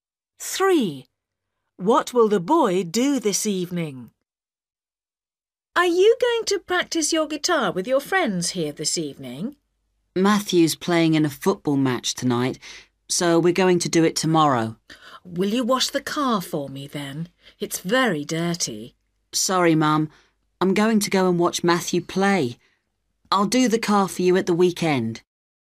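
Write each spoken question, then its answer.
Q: What will the boy do this evening?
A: watch Matthew play football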